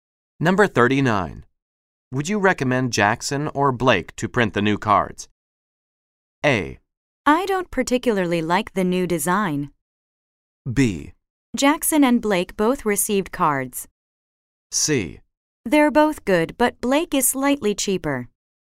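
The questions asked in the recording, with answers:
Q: Would you recommend Jackson or Blake to print the new cards?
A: C: They're both good, but Blake is slightly cheaper.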